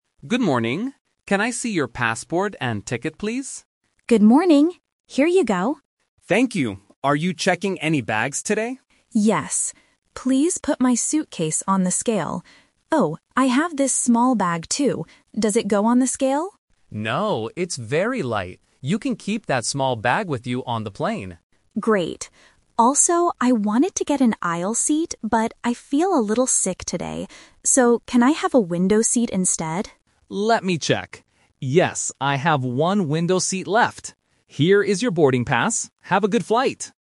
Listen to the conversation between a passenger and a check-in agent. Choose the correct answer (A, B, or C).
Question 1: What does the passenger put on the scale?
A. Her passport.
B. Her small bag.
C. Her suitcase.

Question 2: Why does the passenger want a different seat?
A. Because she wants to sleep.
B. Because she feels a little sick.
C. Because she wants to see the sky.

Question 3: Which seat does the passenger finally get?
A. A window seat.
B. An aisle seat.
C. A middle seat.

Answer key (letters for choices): 1C, 2B, 3A

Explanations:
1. The passenger says, "Please put my suitcase on the scale." She asks about the "small bag" (Option B - The Trap), but the agent says no, she can keep it with her. Option (A) is mentioned at the beginning but is not put on the scale.
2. The passenger clearly explains her reason: "but I feel a little sick today." Options (A) and (C) are common reasons to change seats on a plane, but they are not mentioned in the audio.
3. This is "The Twist". The passenger says, "I wanted to get an aisle seat" (Option B - The Trap), but she changed her mind because she feels sick. She asks for a "window seat instead," and the agent gives it to her. Option (C) is never mentioned.

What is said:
Agent: Good morning. Can I see your passport and ticket, please?
Passenger: Good morning. Here you go.
Agent: Thank you. Are you checking any bags today?
Passenger: Yes. Please put my suitcase on the scale. Oh, I have this small bag too. Does it go on the scale?
Agent: No, it's very light. You can keep that small bag with you on the plane.
Passenger: Great. Also, I wanted to get an aisle seat, but I feel a little sick today. So, can I have a window seat instead?
Agent: Let me check. Yes, I have one window seat left. Here is your boarding pass. Have a good flight!